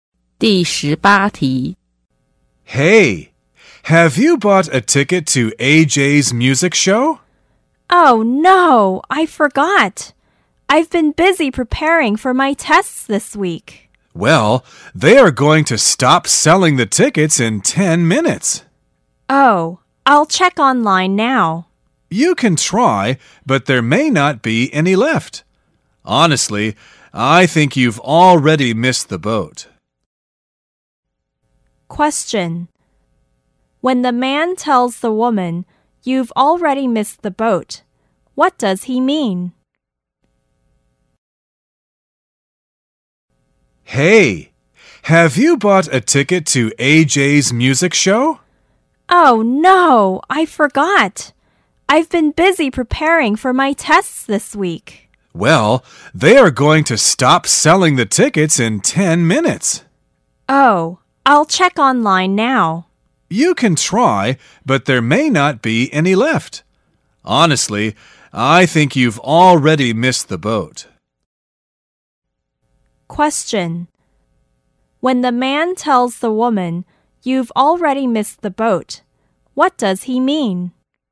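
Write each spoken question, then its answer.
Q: When the man tells the woman, "You've already missed the boat," what does he mean?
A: It is probably too late to get a ticket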